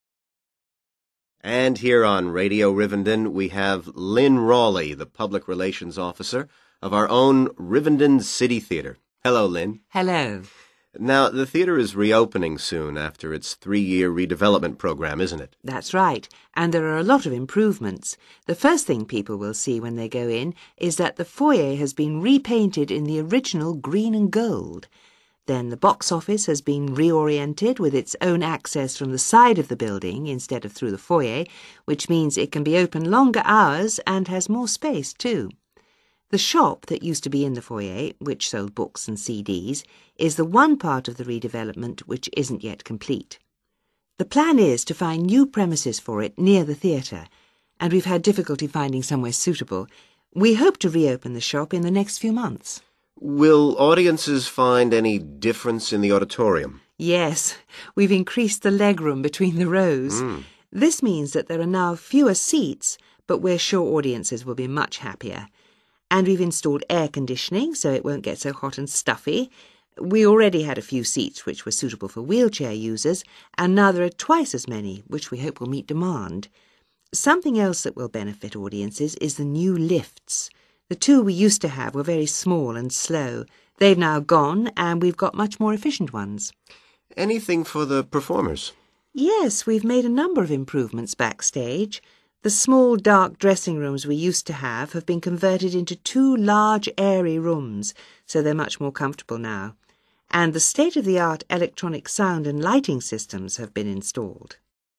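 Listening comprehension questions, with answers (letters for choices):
Choose SIX answers from the box and write the correct letter, A-G, next to questions 11-16.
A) doubled in number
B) given separate entrance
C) reduced in number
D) increased in size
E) replaced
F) strengthened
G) temporarily closed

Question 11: box office ..........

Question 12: shop ..........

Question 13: ordinary seats ..........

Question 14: seats for wheelchair users ..........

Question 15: lifts ..........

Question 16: dressing rooms ..........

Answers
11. B
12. G
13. C
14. A
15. E
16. D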